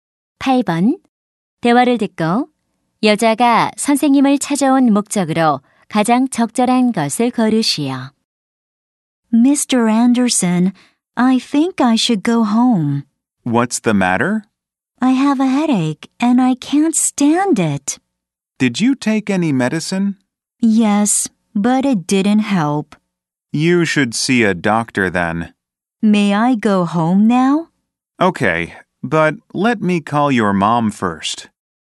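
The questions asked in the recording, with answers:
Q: 대화를 듣고 여자가 선생님을 찾아온 목적으로 가장 적절한 것을 고르시오.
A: 조퇴 허락을 받으려고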